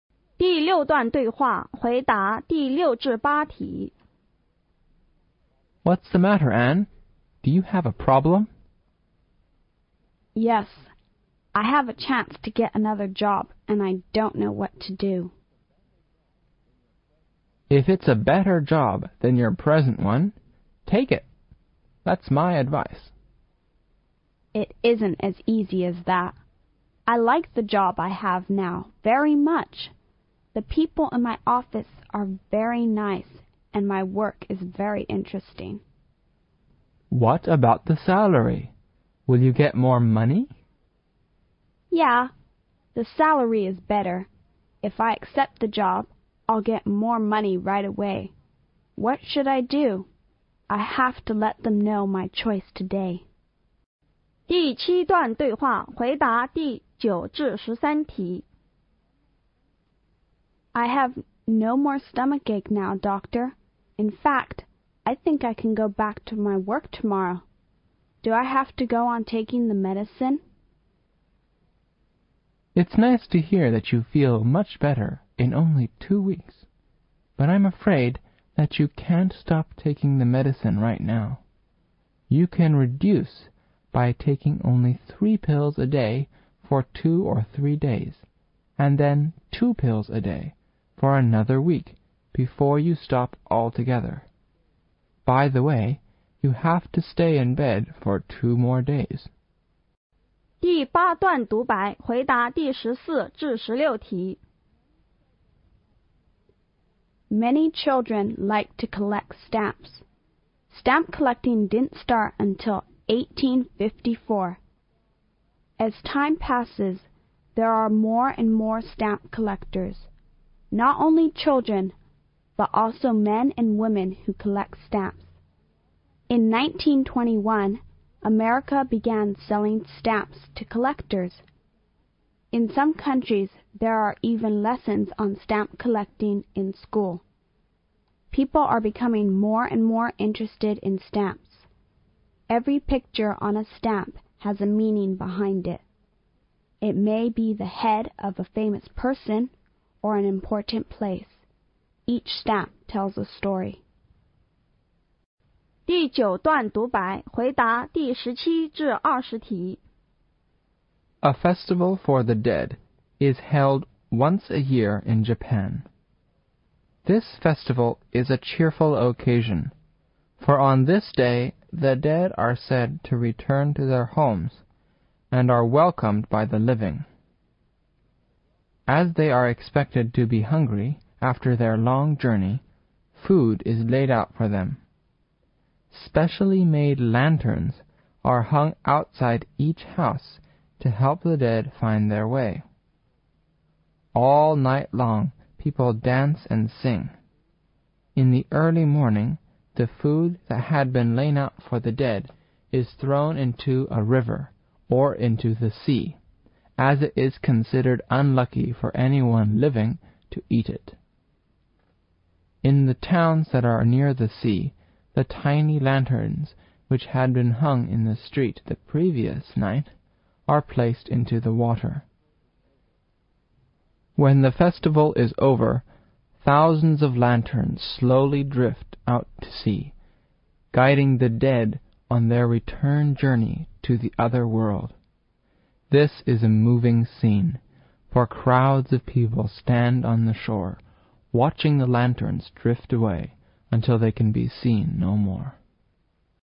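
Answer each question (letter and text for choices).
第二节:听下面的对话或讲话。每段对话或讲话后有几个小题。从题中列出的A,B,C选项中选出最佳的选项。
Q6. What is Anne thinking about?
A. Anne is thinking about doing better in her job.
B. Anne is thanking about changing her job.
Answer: B. Anne is thanking about changing her job.

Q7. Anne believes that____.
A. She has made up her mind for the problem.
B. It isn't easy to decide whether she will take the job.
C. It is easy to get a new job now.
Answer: B. It isn't easy to decide whether she will take the job.

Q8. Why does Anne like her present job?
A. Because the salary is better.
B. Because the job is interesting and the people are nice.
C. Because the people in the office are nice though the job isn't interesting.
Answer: B. Because the job is interesting and the people are nice.

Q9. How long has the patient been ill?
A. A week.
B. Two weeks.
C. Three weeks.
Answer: B. Two weeks.

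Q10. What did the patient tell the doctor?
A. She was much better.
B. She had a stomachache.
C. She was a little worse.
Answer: A. She was much better.

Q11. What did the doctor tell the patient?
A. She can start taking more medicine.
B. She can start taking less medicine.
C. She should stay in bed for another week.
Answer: B. She can start taking less medicine.

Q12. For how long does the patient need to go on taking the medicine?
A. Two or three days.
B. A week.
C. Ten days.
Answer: C. Ten days.

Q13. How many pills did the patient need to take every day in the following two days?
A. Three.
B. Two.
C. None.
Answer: A. Three.

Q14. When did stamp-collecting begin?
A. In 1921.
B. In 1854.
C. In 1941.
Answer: B. In 1854.

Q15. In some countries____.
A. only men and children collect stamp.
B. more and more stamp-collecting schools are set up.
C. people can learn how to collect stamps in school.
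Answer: C. people can learn how to collect stamps in school.

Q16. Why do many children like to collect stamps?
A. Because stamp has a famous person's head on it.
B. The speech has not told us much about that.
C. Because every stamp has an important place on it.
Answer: B. The speech has not told us much about that.

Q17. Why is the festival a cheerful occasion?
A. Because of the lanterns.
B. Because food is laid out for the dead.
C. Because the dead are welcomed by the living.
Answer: C. Because the dead are welcomed by the living.

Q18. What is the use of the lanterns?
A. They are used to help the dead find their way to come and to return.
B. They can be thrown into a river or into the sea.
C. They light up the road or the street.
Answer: A. They are used to help the dead find their way to come and to return.

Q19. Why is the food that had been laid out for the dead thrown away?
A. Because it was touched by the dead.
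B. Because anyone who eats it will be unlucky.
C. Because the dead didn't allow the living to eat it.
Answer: B. Because anyone who eats it will be unlucky.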